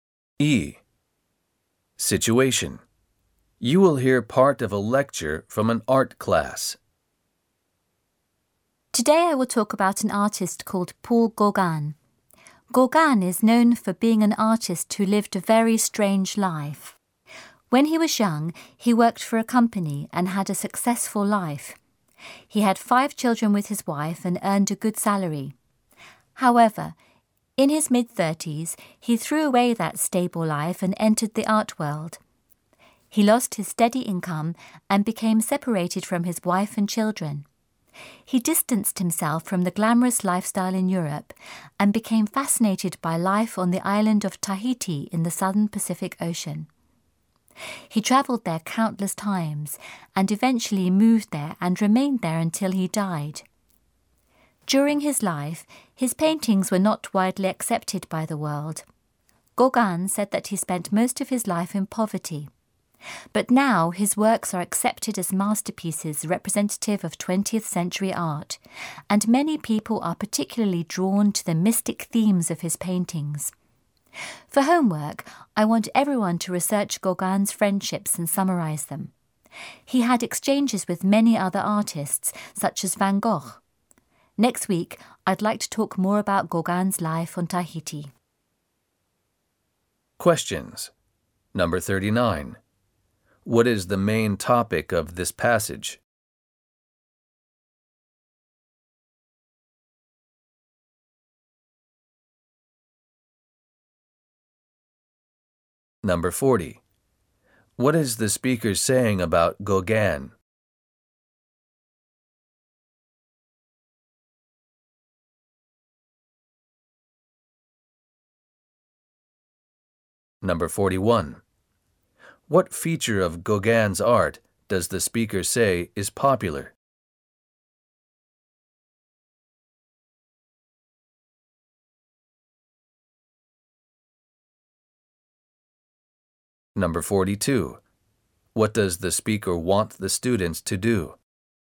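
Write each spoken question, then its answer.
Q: What is the main topic of this passage?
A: The artist Paul Gauguin and his life

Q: What feature of Gauguin's art does the speaker say is popular?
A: The mystic themes of his paintings

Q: What does the speaker want the students to do?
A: Research Gauguin's friendships and summarise them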